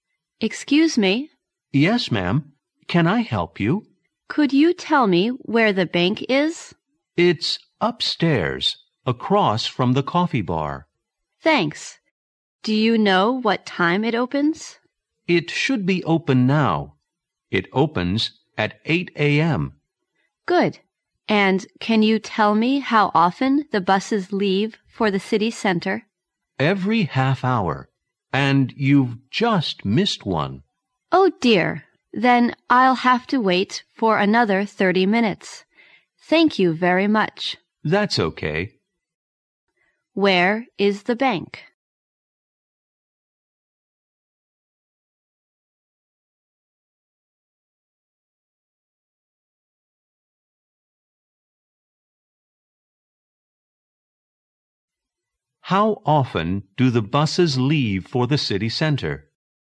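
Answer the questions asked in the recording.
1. Upstairs, across from the coffee bar
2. Every half hour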